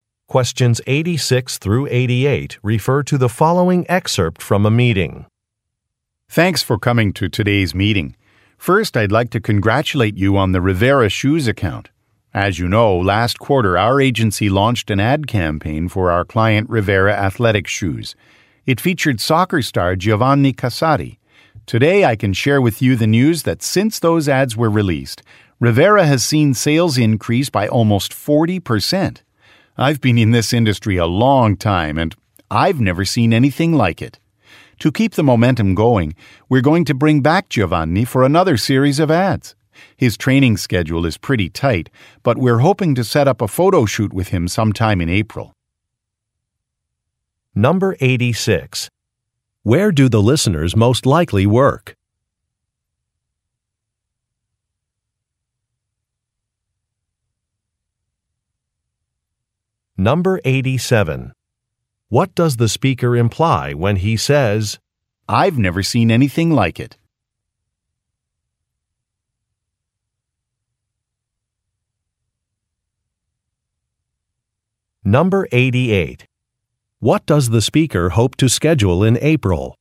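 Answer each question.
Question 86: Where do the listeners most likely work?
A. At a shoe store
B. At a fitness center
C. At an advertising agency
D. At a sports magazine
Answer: At an advertising agency

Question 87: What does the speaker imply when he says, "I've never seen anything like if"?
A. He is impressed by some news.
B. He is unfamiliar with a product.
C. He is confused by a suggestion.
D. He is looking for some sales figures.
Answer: He is impressed by some news.

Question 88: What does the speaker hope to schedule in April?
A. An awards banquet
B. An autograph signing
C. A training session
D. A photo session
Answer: A photo session

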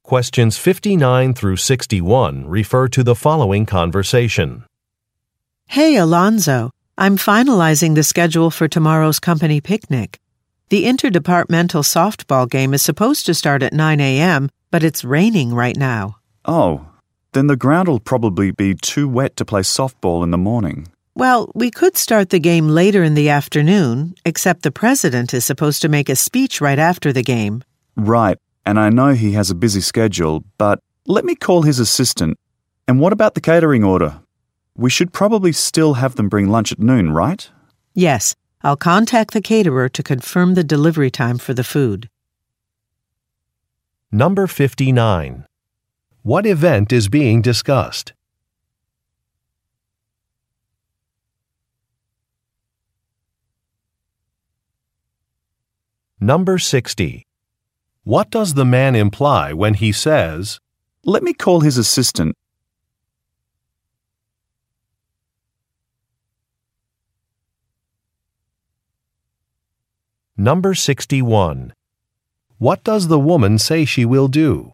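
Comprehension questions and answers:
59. What event is being discussed?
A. A company picnic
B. A professional conference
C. A grand opening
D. An investors meeting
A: A company picnic

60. What does the man imply when he says, "let me call his assistant"?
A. He will volunteer to prepare a speech.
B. He will find a new location.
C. He will ask for a schedule change.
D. He will make a complaint.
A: He will ask for a schedule change.

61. What does the woman say she will do?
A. Print out a map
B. Confirm a catering order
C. Clean some sports equipment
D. Mail some invitations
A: Confirm a catering order

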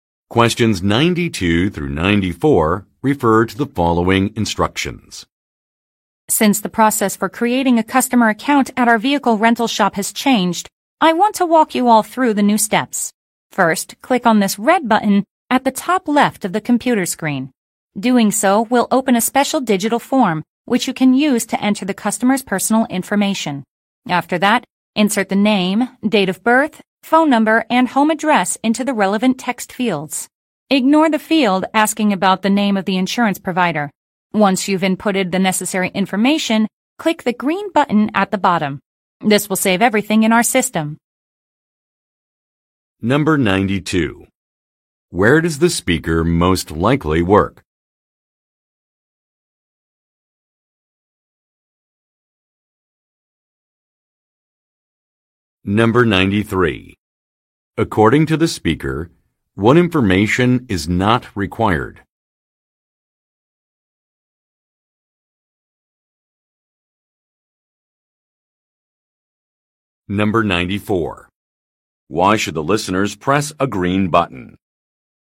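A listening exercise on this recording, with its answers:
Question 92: Where does the speaker most likely work?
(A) At a bank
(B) At an auto repair shop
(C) At a rental agency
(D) At a retailer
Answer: At a rental agency

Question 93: According to the speaker, what information is not required?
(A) Birth date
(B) Phone number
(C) Insurance provider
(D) Home address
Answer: Insurance provider

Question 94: Why should the listeners press a green button?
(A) To save some details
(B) To request technical support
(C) To print a document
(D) To close a Web page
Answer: To save some details

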